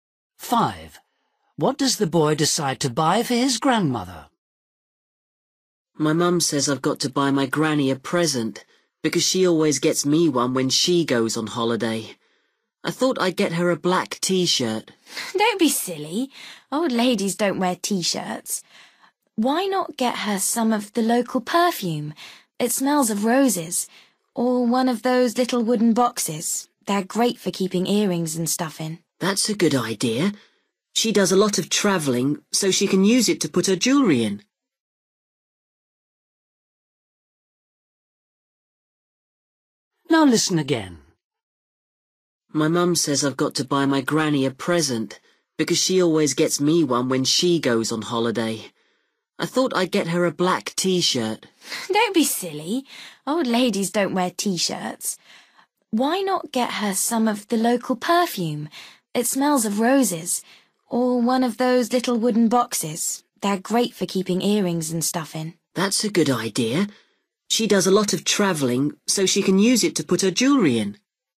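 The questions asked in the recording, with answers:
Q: What does the boy decide to buy for his grandmother?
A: a little wooden box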